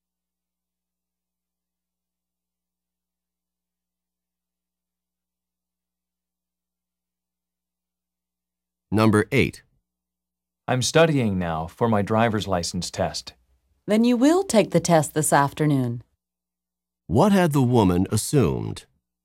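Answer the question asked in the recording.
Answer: The man would not take the test this afternoon.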